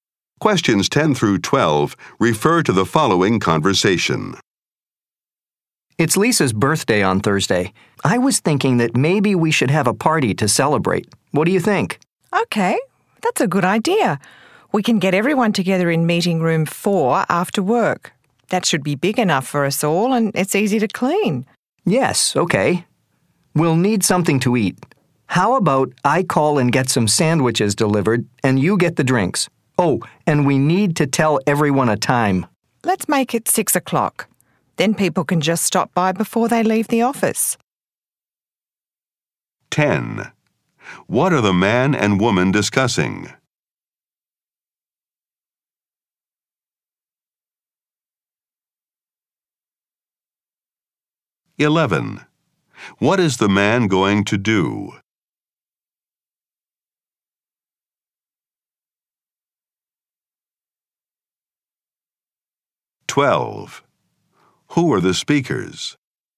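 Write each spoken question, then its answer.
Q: What are the man and woman discussing?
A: A birthday party for Lisa

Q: Who are the speakers?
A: Coworkers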